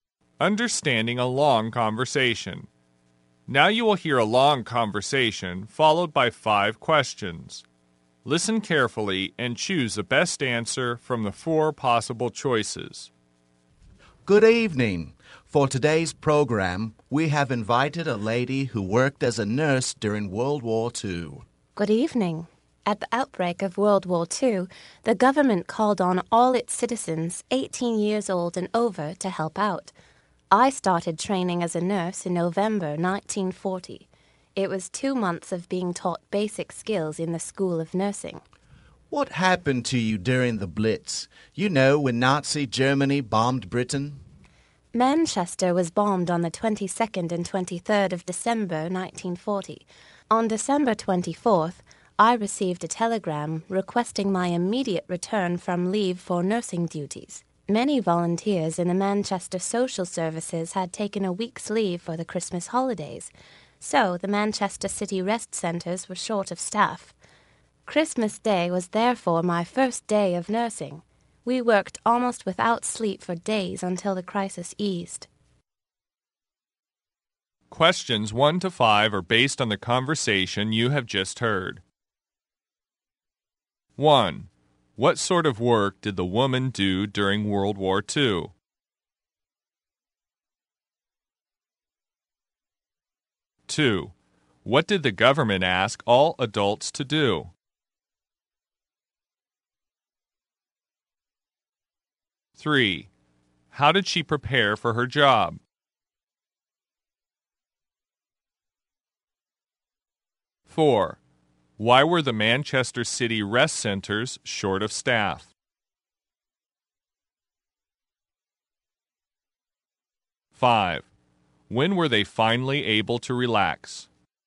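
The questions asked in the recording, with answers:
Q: What sort of work did the woman do during World War II?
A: She was a nurse

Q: What did the government ask all adults to do?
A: To help out

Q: How did she prepare for her job?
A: Two months of training in basic skills at the School of Nursing

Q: Why were the Manchester City rest centers short of staff?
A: Many volunteers had taken a week's leave for Christmas

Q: When were they finally able to relax?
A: When the crisis eased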